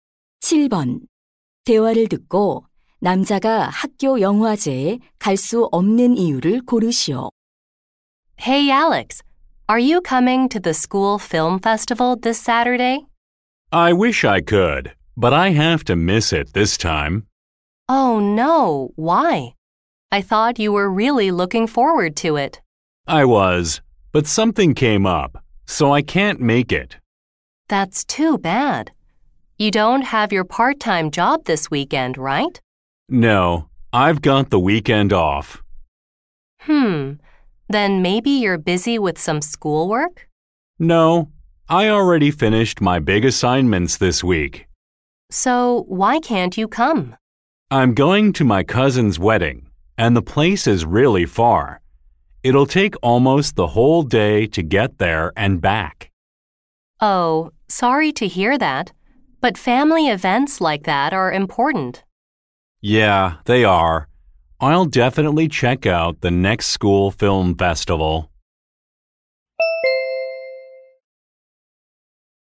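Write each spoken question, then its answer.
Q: 대화를 듣고 남자가 학교 영화제에 갈 수 없는 이유를 고르시오.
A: 사촌의 결혼식에 가야 해서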